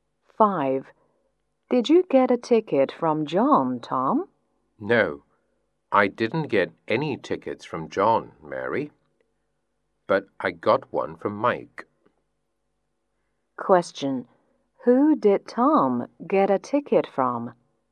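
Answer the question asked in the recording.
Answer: Mike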